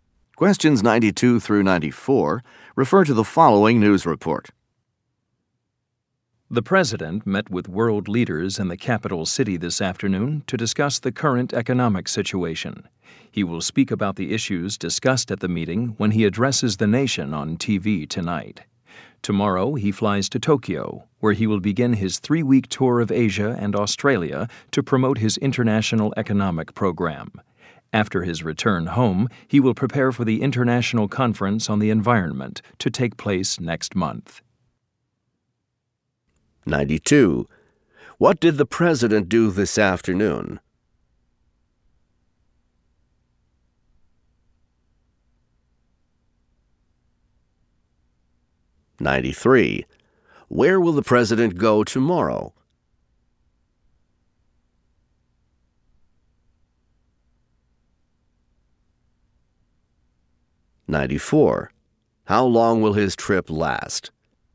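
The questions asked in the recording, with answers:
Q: What did the president do this afternoon?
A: He met with world leaders

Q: Where will the president go tomorrow?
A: To Tokyo

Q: How long will his trip last?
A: Three weeks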